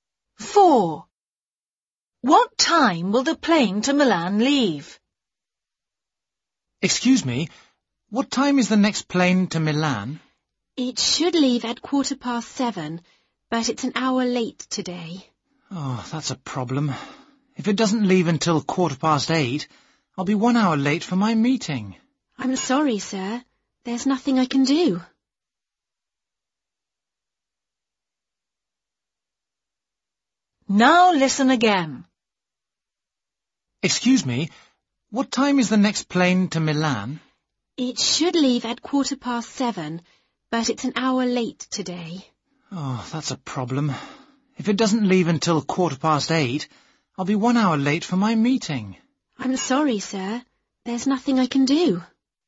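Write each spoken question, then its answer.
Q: What time will the plane to Milan leave?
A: 8:15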